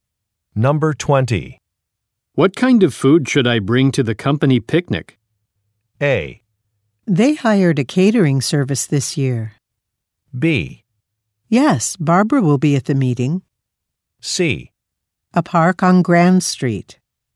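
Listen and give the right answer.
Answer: A: They hired a catering service this year.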